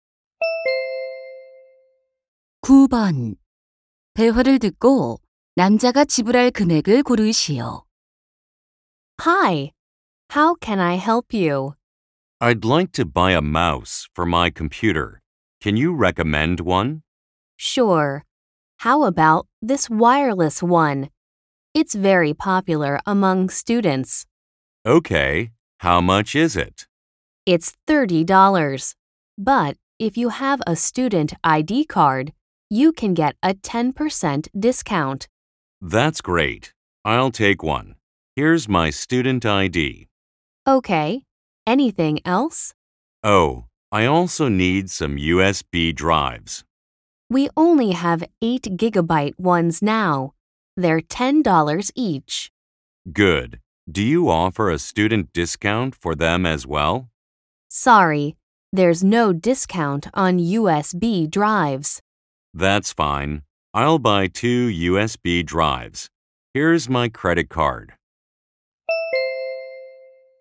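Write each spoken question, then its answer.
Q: 대화를 듣고 남자가 지불할 금액을 고르시오.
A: $47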